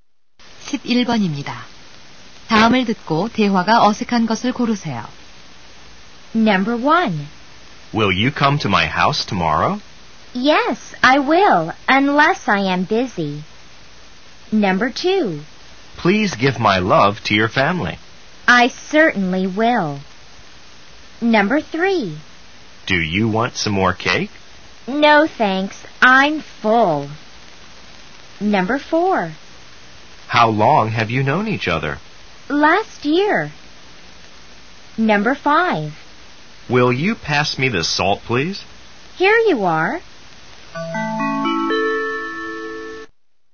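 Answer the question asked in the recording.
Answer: 4: How long have you known each other? / Last year.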